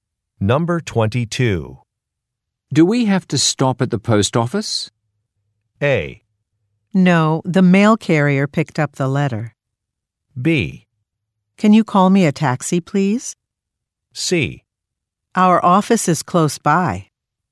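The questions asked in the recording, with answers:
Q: Do we have to stop at the post office?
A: A: No, the mail carrier picked up the letter.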